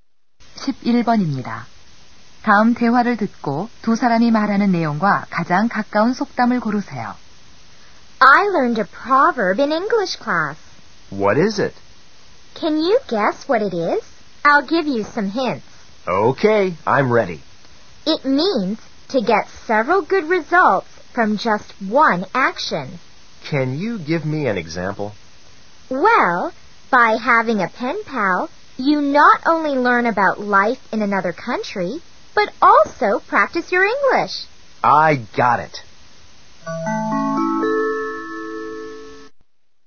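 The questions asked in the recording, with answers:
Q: 다음 대화를 듣고 두 사람이 말하는 내용과 가장 가까운 속담을 고르세요.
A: 일석이조 (Kill two birds with one stone)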